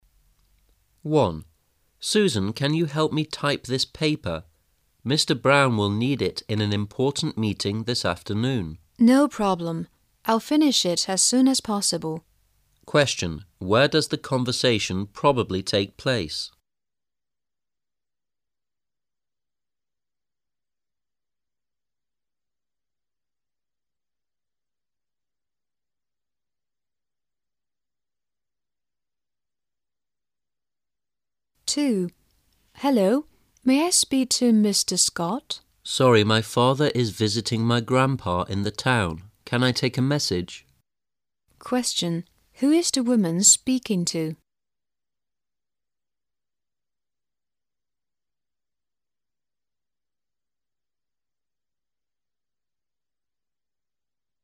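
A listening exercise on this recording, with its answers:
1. Where does the conversation probably take place?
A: In an office

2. Who is the woman speaking to?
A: Mr. Scott's son

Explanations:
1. M: Susan, can you help me type this paper? Mr. Brown will need it in an important meeting this afternoon. W: No problem. I will finish it as soon as possible. Q: Where does the conversation probably take place?
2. W: Hello, may I speak to Mr. Scott? M: Sorry, my father is visiting my grandpa in the town. Can I take a message? Q: Who is the woman speaking to?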